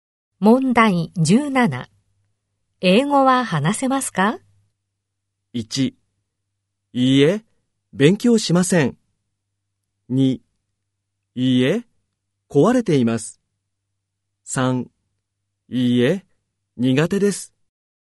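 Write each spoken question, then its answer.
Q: 英語は話せますか?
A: 3: いいえ、苦手です。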